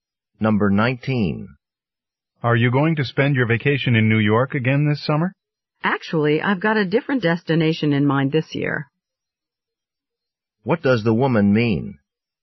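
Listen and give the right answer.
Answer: She plans to go somewhere other than New York this summer.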